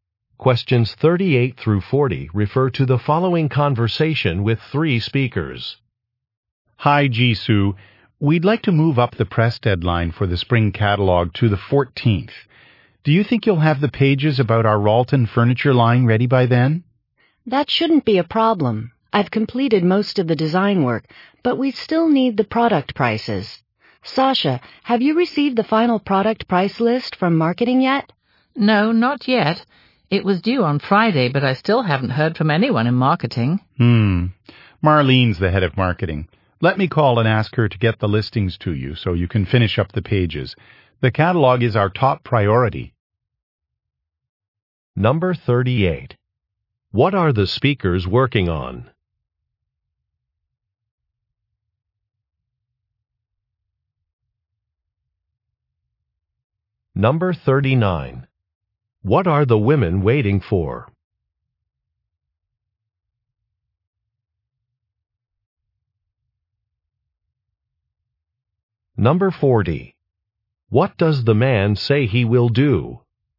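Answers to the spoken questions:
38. A spring catalog
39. The final product price list from marketing
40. Call the head of marketing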